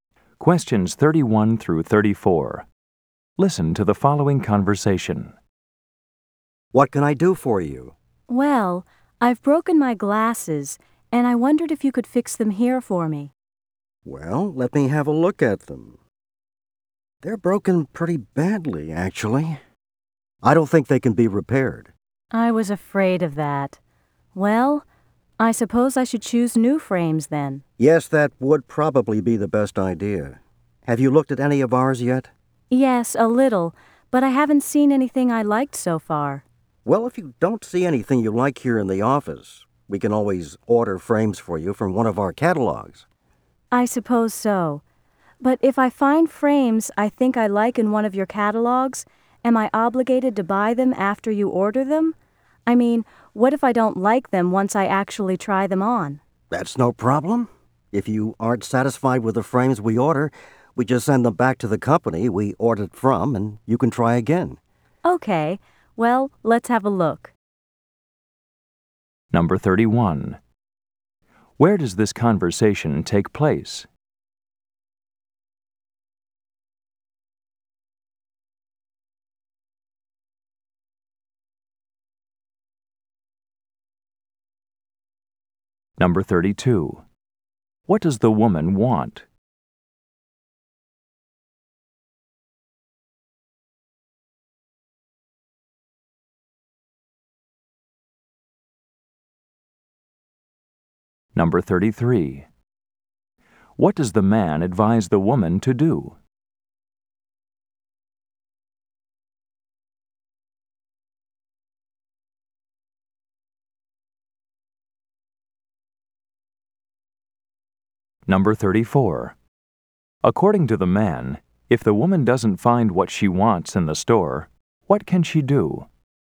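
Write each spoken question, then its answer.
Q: Where does this conversation take place?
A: At an optician's office

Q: What does the woman want?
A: To have her broken glasses fixed

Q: What does the man advise the woman to do?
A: Choose new frames

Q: According to the man, if the woman doesn't find what she wants in the store, what can she do?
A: Order frames from one of their catalogs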